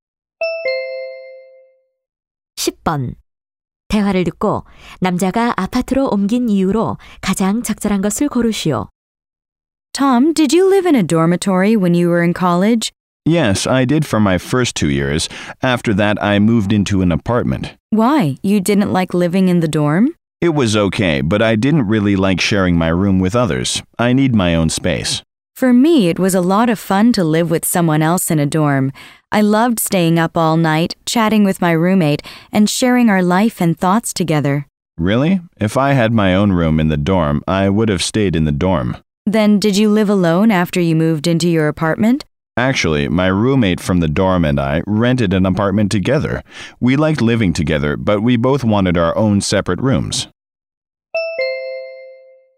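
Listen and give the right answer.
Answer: 자기만의 방을 갖고 싶어서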